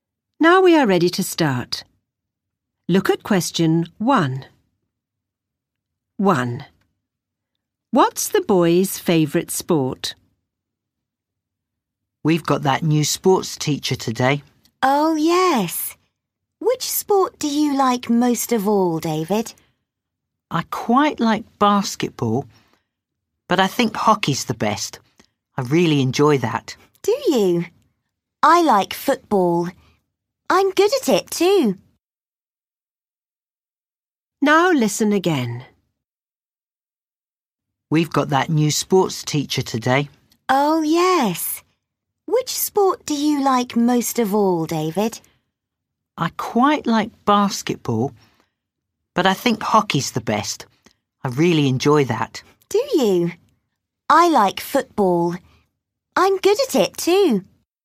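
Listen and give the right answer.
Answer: hockey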